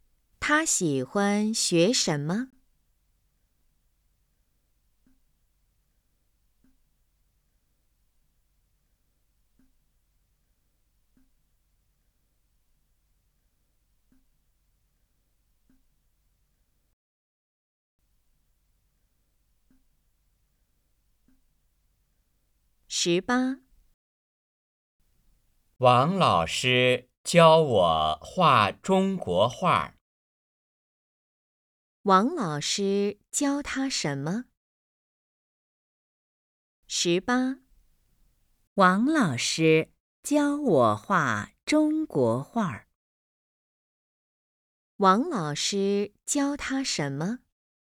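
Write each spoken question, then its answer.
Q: 王老师教他什么?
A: 画中国画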